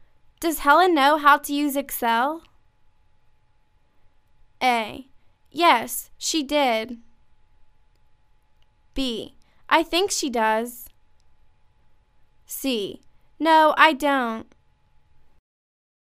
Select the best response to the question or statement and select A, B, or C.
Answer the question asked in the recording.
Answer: I think she does.